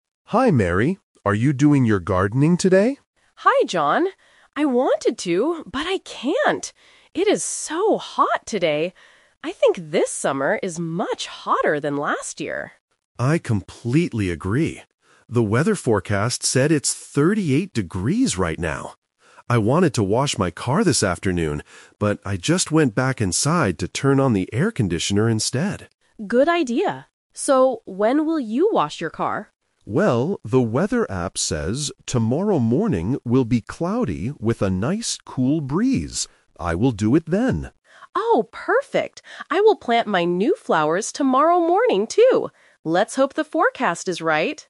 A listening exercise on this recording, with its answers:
Listen to the conversation and choose the correct answer (A, B, or C).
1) What do the neighbors think about this summer?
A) It is much rainier than last year.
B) It is much hotter than last year.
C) It is cooler than last year.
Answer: It is much hotter than last year.

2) What did John do this afternoon instead of washing his car?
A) He washed his car in the sun.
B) He helped Mary plant flowers.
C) He went inside to turn on the air conditioner.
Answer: He went inside to turn on the air conditioner.

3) What is the weather forecast for tomorrow morning?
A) Sunny and very hot.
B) Cloudy with a cool breeze.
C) Rainy and windy.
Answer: Cloudy with a cool breeze.

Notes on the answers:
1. Mary explicitly states, "I think this summer is much hotter than last year," and John agrees. Option (A) is a plausible weather condition but is not mentioned. Option (C) is the opposite of the correct answer.
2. John says he wanted to wash his car (Plan A), "but I just went back inside to turn on the air conditioner instead" (Plan B - The Twist). Option (A) is the trap because it was his initial plan, but he rejected it due to the heat. Option (B) is a trap because planting flowers is Mary's task for tomorrow.
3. John checks the app and says, "tomorrow morning will be cloudy with a nice cool breeze." Option (A) is a trap because it describes today's weather, not tomorrow's. Option (C) is never mentioned in the audio.

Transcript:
John: Hi, Mary. Are you doing your gardening today?
Mary: Hi, John. I wanted to, but I can't. It is so hot today! I think this summer is much hotter than last year.
John: I completely agree. The weather forecast said it's 38 degrees right now. I wanted to wash my car this afternoon, but I just went back inside to turn on the air conditioner instead.
Mary: Good idea. So, when will you wash your car?
John: Well, the weather app says tomorrow morning will be cloudy with a nice cool breeze. I will do it then.
Mary: Oh, perfect. I will plant my new flowers tomorrow morning, too. Let's hope the forecast is right!

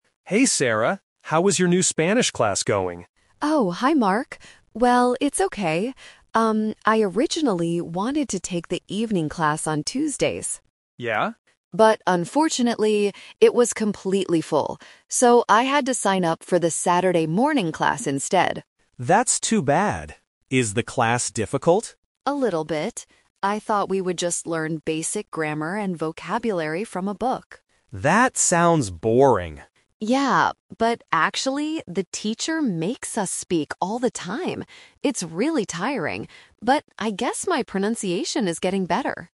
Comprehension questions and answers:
Listen to the conversation and circle the correct answer (A, B, or C).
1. When does Sarah take her Spanish class?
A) On Tuesday evenings.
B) On Saturday mornings.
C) On Sunday afternoons.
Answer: On Saturday mornings.

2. What did Sarah expect to do in the class before it started?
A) Practice speaking all the time.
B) Learn grammar from a book.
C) Watch Spanish movies.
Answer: Learn grammar from a book.

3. How does Sarah feel about the class now?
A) She thinks it is very boring.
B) She finds it tiring but helpful.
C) She thinks it is too easy.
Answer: She finds it tiring but helpful.

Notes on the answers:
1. Sarah says, "I had to sign up for the Saturday morning class instead."
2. Sarah says, "I thought we would just learn basic grammar and vocabulary from a book." This was her expectation.
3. She says the class is "really tiring," but she also notes a positive result: "my pronunciation is getting better" (which means it is helpful).

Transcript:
Mark: Hey Sarah! How is your new Spanish class going?
Sarah: Oh, hi Mark. Well, it's okay. Um, I originally wanted to take the evening class on Tuesdays.
Mark: Yeah?
Sarah: But unfortunately, it was completely full. So, I had to sign up for the Saturday morning class instead.
Mark: That's too bad. Is the class difficult?
Sarah: A little bit. I thought we would just learn basic grammar and vocabulary from a book.
Mark: That sounds boring.
Sarah: Yeah, but actually, the teacher makes us speak all the time! It's really tiring, but I guess my pronunciation is getting better.

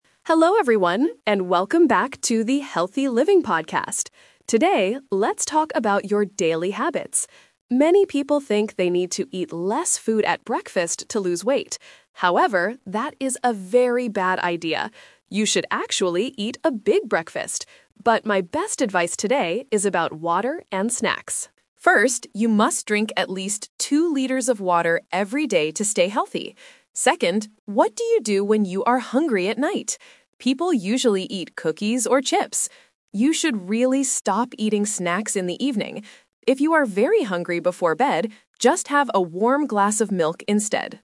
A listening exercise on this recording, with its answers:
Listen to a nutritionist speaking on a podcast, and choose the correct answer (A, B, or C) for each question.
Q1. What does the speaker say about breakfast?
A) You should eat less food.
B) You should eat a big breakfast.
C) You should only drink juice.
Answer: You should eat a big breakfast.

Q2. How much water should a person drink every day?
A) One liter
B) Two liters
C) Three liters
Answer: Two liters

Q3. What does the speaker tell people NOT to do in the evening?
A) Eat snacks like cookies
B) Drink a glass of milk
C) Watch television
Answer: Eat snacks like cookies

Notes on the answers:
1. The nutritionist clearly says, "You should actually eat a big breakfast." Option (A) is the trap; she says that many people think they should eat less, but she calls this a "bad idea." Option (C) is a plausible healthy habit but is never mentioned in the audio.
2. The speaker explicitly states, "you must drink at least two liters of water every day." Options (A) and (C) are plausible amounts of water, but they are not the numbers mentioned by the expert.
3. The nutritionist gives direct advice: "You should really stop eating snacks in the evening," and she mentions cookies and chips as examples. Option (B) is a trap; drinking milk is what you should do if you are hungry at night. Option (C) is a common evening activity but is not mentioned.

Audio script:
Nutritionist: Hello everyone, and welcome back to the 'Healthy Living' podcast. Today, let's talk about your daily habits. Many people think they need to eat less food at breakfast to lose weight. However, that is a very bad idea! You should actually eat a big breakfast. But my best advice today is about water and snacks. First, you must drink at least two liters of water every day to stay healthy. Second, what do you do when you are hungry at night? People usually eat cookies or chips. You should really stop eating snacks in the evening.

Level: A2

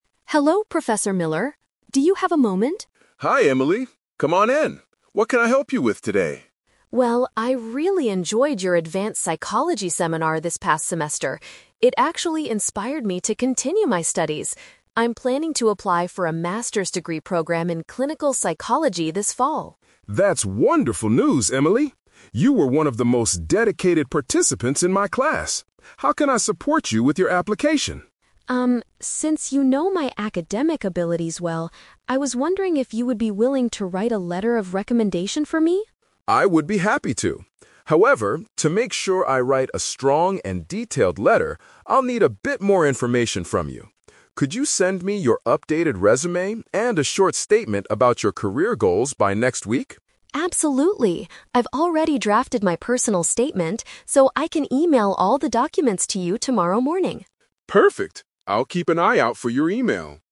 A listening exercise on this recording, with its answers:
Listen to a conversation between a student and a professor. Choose the best answer (A, B, or C) for each question.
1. Why does Emily visit Professor Miller?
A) To discuss her final grade in the psychology seminar.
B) To ask for a reference document for her postgraduate application.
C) To hand in her updated resume and personal statement in person.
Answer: To ask for a reference document for her postgraduate application.

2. How does the professor respond to Emily's request?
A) He gladly agrees because she was a hardworking learner in his course.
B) He hesitates because he doesn't remember her academic abilities.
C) He refuses because he is too busy writing his own research papers.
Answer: He gladly agrees because she was a hardworking learner in his course.

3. What does the professor ask Emily to provide?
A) An extra essay about her experience in his seminar.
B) A summary of her future professional plans.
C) An email addressing the university's admission office.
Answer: A summary of her future professional plans.

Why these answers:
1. Emily states she is applying for a "Master's degree program" and asks for a "letter of recommendation." Paraphrasing: postgraduate = Master's degree; reference document = letter of recommendation. Trap: Option A is a trap because the "psychology seminar" is mentioned, but she doesn't ask about her grade. Option C is wrong because she promises to "email all the documents... tomorrow morning," not hand them in right now (in person).
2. Professor Miller says "I would be happy to" and notes that she was "one of the most dedicated participants in my class." Paraphrasing: hardworking learner = dedicated participants. Trap: Option B is the exact opposite of the audio (Emily says "since you know my academic abilities well"). Option C is completely made up (not mentioned in the audio).
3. The professor asks for an updated resume and "a short statement about your career goals." Paraphrasing: future professional plans = career goals. Trap: Option A is incorrect; he mentions writing a strong letter, but doesn't ask for an essay about his class. Option C is a trap because while they mention an "email," she is emailing the documents to him, not to the university's admission office.

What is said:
Emily: Hello, Professor Miller. Do you have a moment?
Professor Miller: Hi Emily. Come on in. What can I help you with today?
Emily: Well, I really enjoyed your advanced psychology seminar this past semester. It actually inspired me to continue my studies. I'm planning to apply for a Master's degree program in clinical psychology this fall.
Professor Miller: That's wonderful news, Emily. You were one of the most dedicated participants in my class. How can I support you with your application?
Emily: Um, since you know my academic abilities well, I was wondering if you would be willing to write a letter of recommendation for me?
Professor Miller: I would be happy to. However, to make sure I write a strong and detailed letter, I'll need a bit more information from you. Could you send me your updated resume and a short statement about your career goals by next week?
Emily: Absolutely! I've already drafted my personal statement, so I can email all the documents to you tomorrow morning.

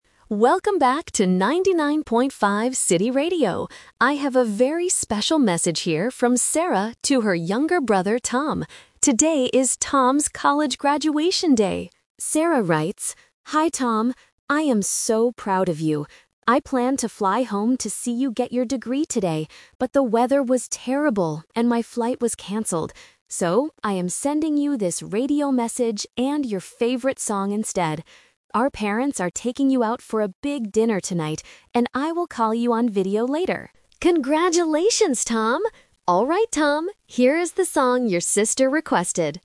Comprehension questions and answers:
Listen to a radio DJ reading a message. Choose the correct answer (A, B, or C) for each question.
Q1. Who is receiving this radio message?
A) Sarah.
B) Tom.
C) The radio DJ.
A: Tom.

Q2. Why didn't Sarah go to the graduation?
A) Because her flight was canceled.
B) Because she had to go to a dinner.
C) Because she had to work late.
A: Because her flight was canceled.

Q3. What will Sarah do later tonight?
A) Fly back home.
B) Take Tom out for dinner.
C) Call Tom on video.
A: Call Tom on video.

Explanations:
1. The DJ clearly says the message is "from Sarah to her younger brother, Tom." Option (A) is the trap because Sarah is the one sending the message, not receiving it. Option (C) is the person speaking, not the receiver.
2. This is "The Twist". Sarah planned to fly home, "but the weather was terrible, and my flight was canceled." Option (B) is a trap because the "big dinner" is mentioned, but it's for Tom and their parents, not the reason Sarah was absent. Option (C) is a plausible reason but is not mentioned.
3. In the message, Sarah promises: "I will call you on video later." Option (A) is a trap because flying home was her original plan that failed. Option (B) is a trap because "our parents" are taking Tom out for dinner, not Sarah.

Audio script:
Radio DJ (Monologue): Welcome back to 99.5 City Radio. I have a very special message here from Sarah to her younger brother, Tom. Today is Tom's college graduation day! Sarah writes: "Hi Tom. I am so proud of you. I planned to fly home to see you get your degree today, but the weather was terrible, and my flight was canceled. So, I am sending you this radio message and your favorite song instead. Our parents are taking you out for a big dinner tonight, and I will call you on video later. Congratulations, Tom!" Alright, Tom, here is the song your sister requested.

